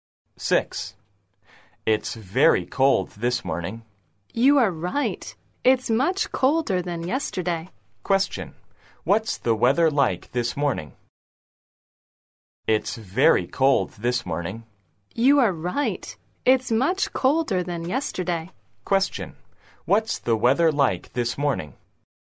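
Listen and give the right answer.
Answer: It's very cold, much colder than yesterday.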